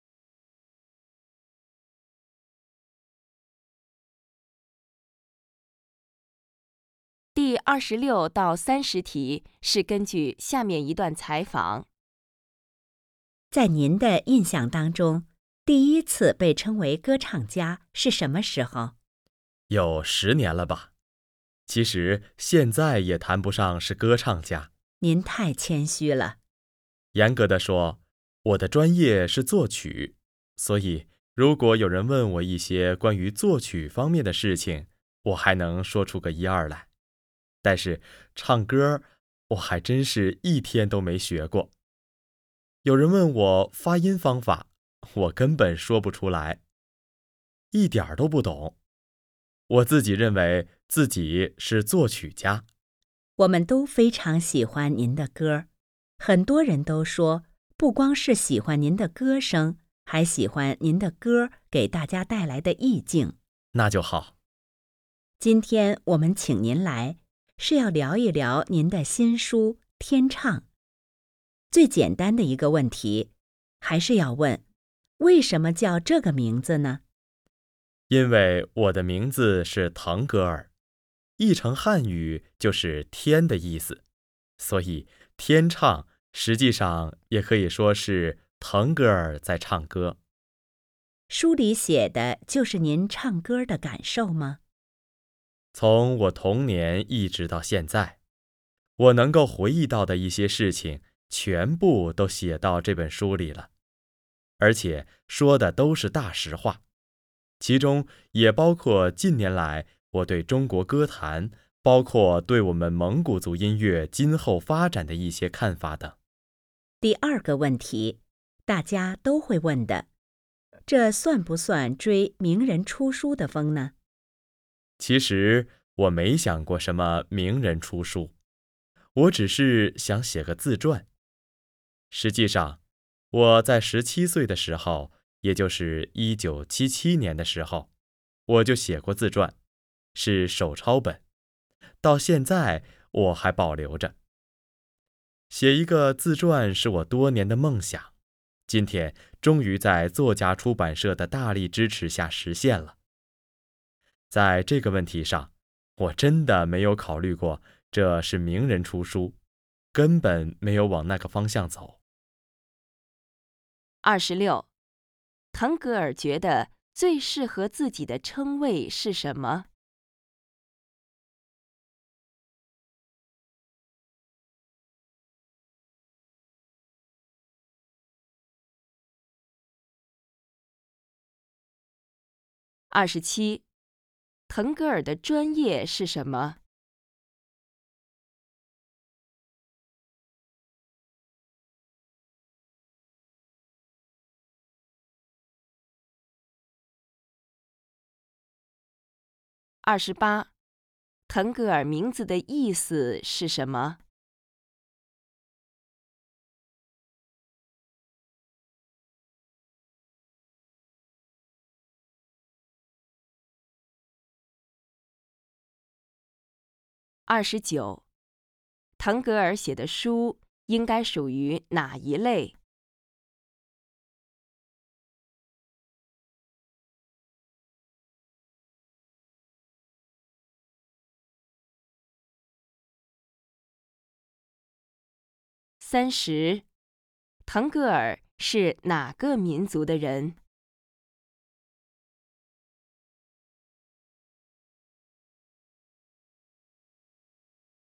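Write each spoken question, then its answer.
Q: 腾格尔觉得最适合自己的称谓是什么?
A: 作曲家

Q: 腾格尔的专业是什么?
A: 作曲

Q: 腾格尔写的书应该属于哪一类?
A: 自传

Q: 腾格尔是哪个民族的人?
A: 蒙古族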